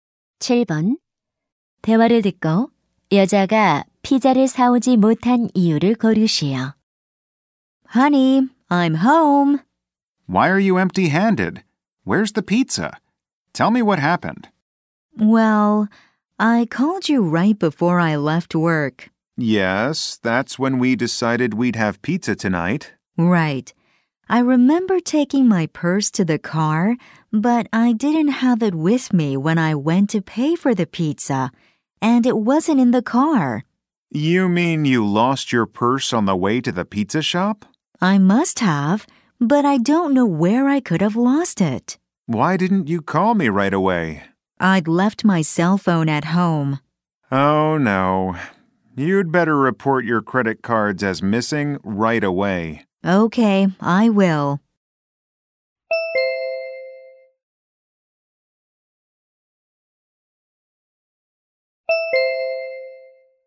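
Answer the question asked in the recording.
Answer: 지갑을 잃어버려서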